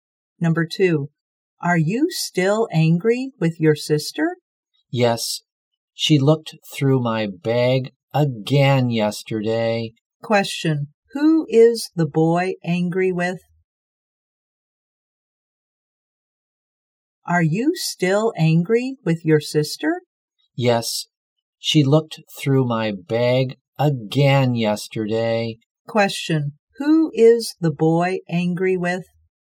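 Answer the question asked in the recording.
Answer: His sister.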